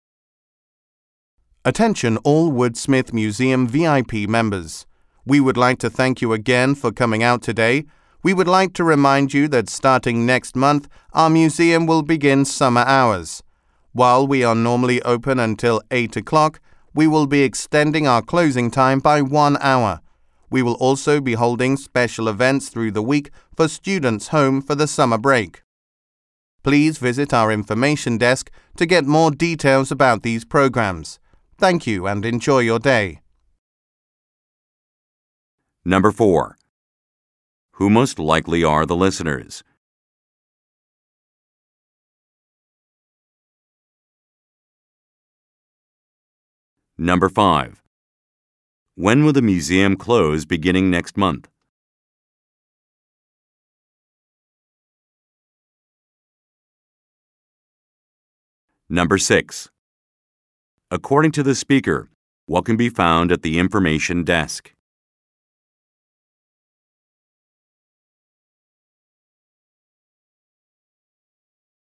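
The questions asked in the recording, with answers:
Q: Who most likely are the listeners?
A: Woodsmith Museum VIP members

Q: When will the museum close beginning next month?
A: At 9 o'clock

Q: According to the speaker, what can be found at the information desk?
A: More details about the special summer programs for students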